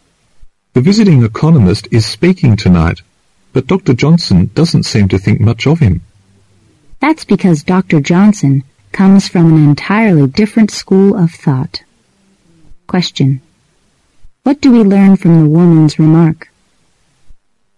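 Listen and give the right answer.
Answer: Dr. Johnson disagrees with the economist's views because he belongs to a different school of thought.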